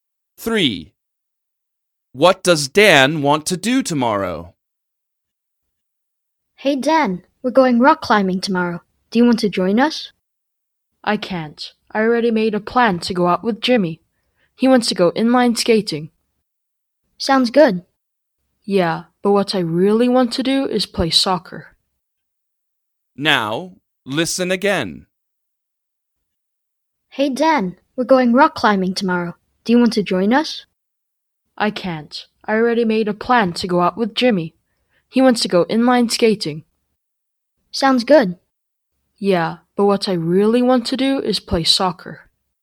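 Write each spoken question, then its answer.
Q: What does Dan want to do tomorrow?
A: Play soccer.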